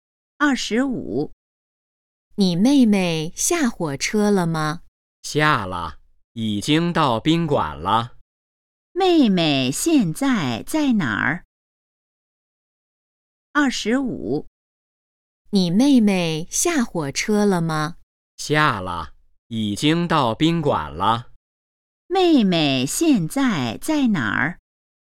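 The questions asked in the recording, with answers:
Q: 妹妹现在在哪儿?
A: 宾馆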